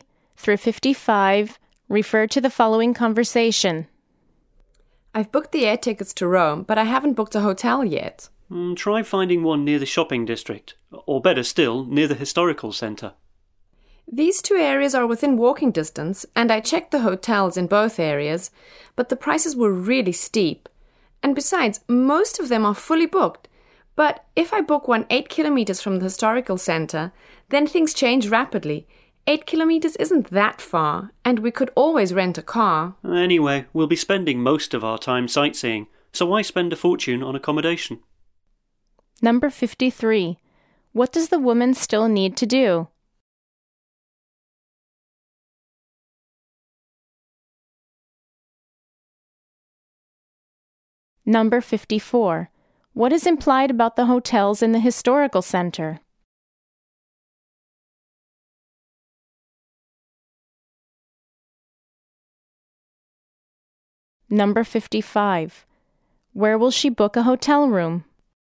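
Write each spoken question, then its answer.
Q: What does the woman still need to do?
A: Book a hotel

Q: What is implied about the hotels in the historical center?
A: They are expensive and mostly fully booked

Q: Where will she book a hotel room?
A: About 8 kilometres from the historical centre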